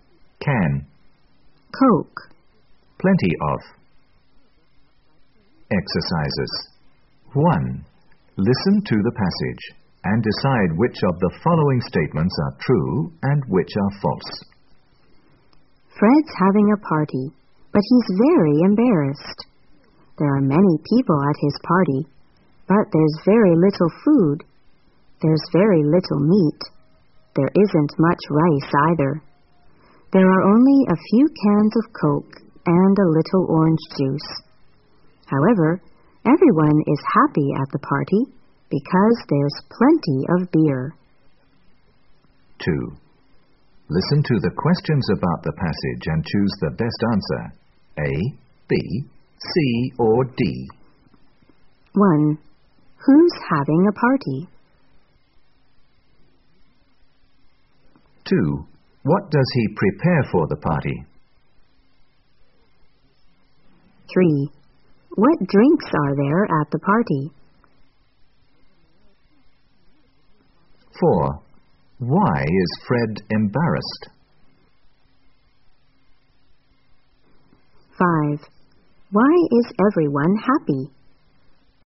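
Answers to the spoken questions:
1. Fred
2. A little meat, rice, a few cans of Coke, a little orange juice and plenty of beer
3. Coke, orange juice and beer
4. There are many people but very little food
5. There's plenty of beer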